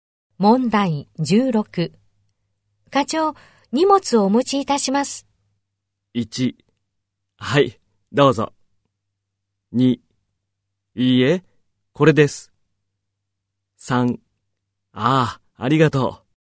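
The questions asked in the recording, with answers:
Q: 課長、荷物をお持ちいたします。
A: 3: ああ、ありがとう。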